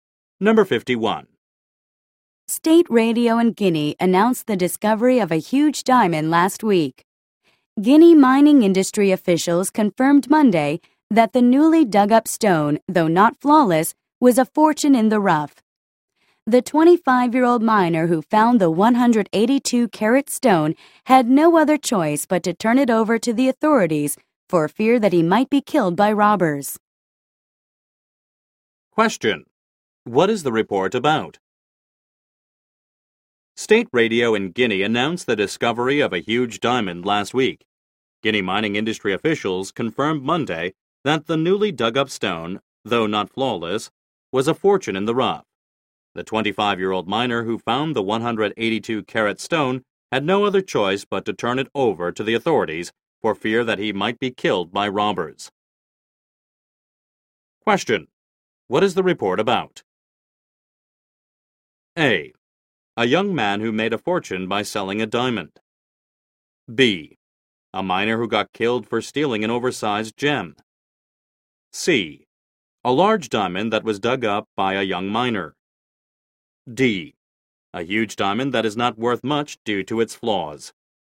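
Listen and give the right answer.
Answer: C: A large diamond that was dug up by a young miner.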